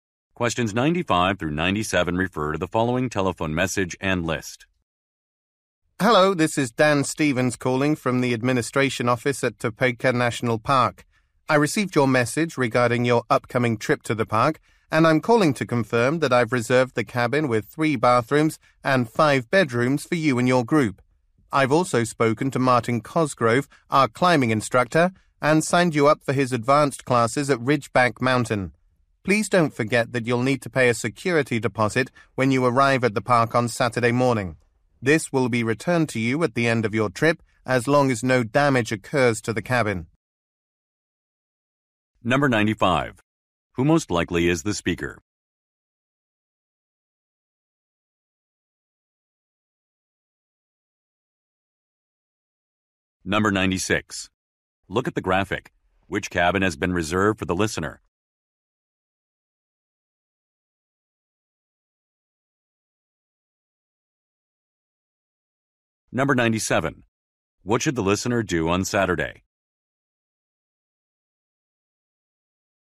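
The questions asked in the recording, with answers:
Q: Who most likely is the speaker?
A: A national park administration employee

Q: What should the listener do on Saturday?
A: Pay a security deposit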